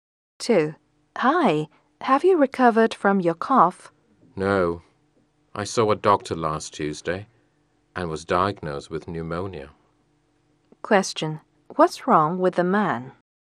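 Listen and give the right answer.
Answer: He has pneumonia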